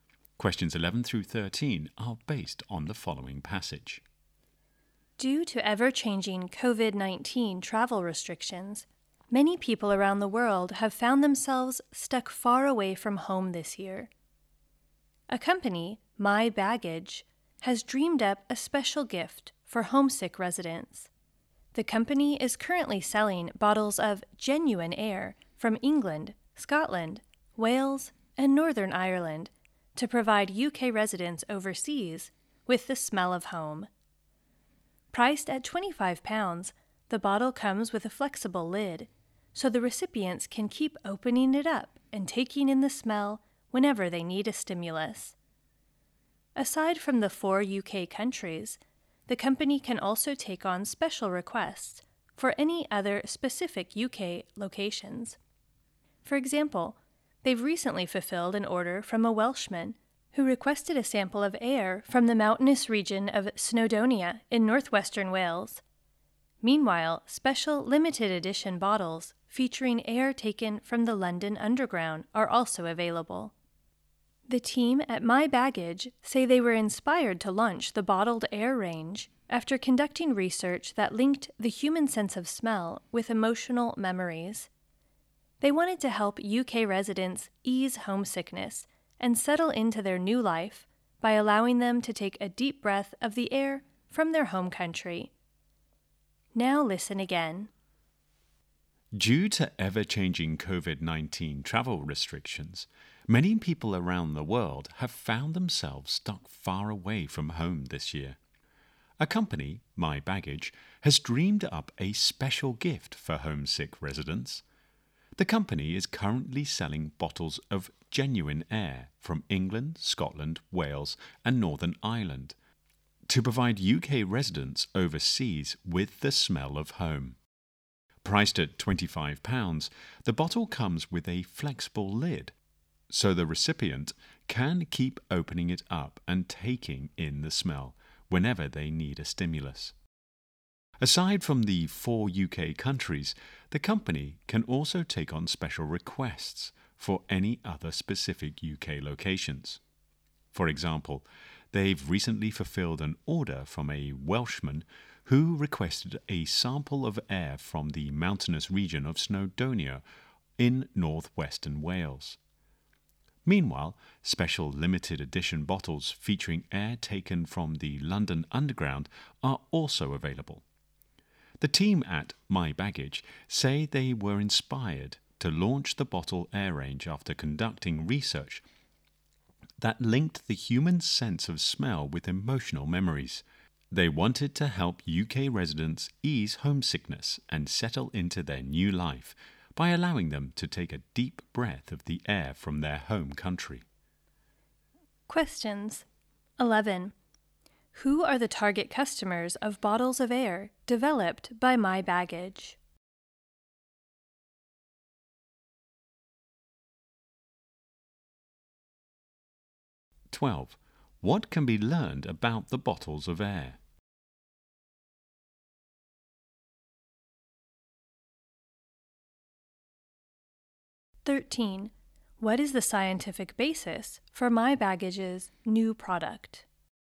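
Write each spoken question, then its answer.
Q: Who are the target customers of bottles of air developed by My Baggage?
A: UK residents living overseas

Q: What is the scientific basis for My Baggage's new product?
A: Research linking the sense of smell with emotional memories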